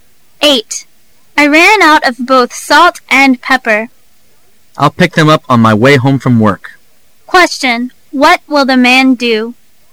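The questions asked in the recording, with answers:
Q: What will the man do?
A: Buy salt and pepper on his way home from work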